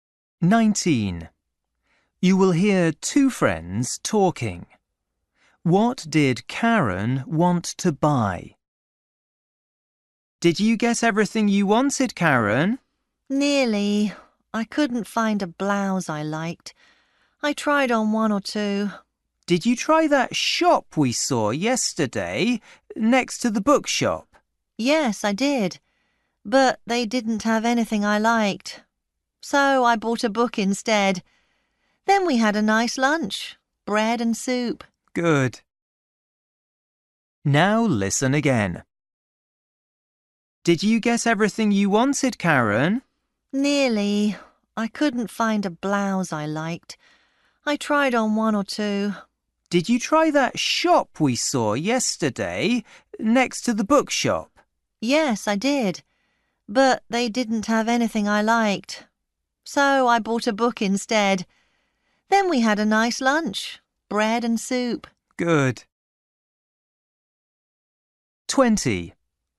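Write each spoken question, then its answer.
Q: What did Karen want to buy?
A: a blouse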